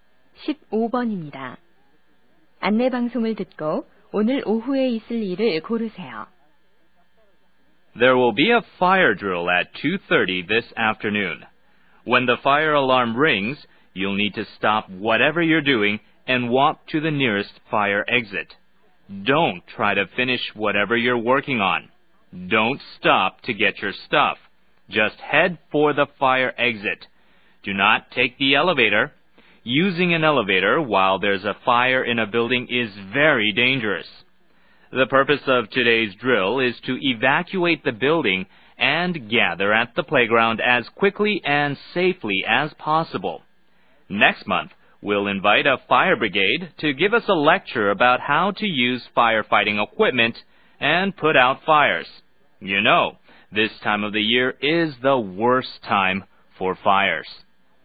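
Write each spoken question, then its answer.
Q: 안내 방송을 듣고 오늘 오후에 있을 일을 고르세요.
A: 화재 대피 훈련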